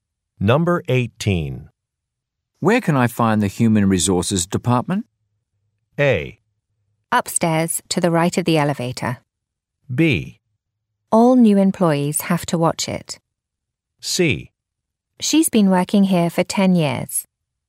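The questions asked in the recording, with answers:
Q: Where can I find the Human Resources Department?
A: A: Upstairs, to the right of the elevator.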